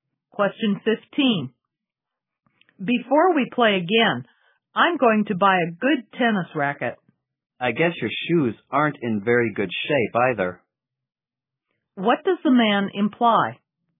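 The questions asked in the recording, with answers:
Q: What does the man imply?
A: The woman should buy new tennis shoes too.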